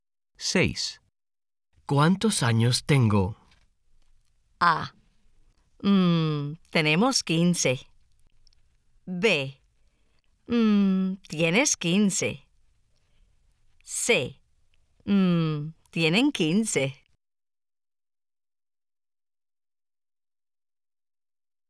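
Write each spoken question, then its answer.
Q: ¿Cuántos años tengo?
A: B: Tienes 15.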